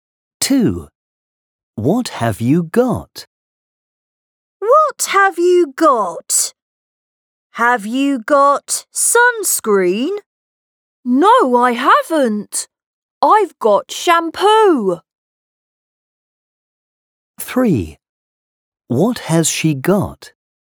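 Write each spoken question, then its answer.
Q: What have you got?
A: Shampoo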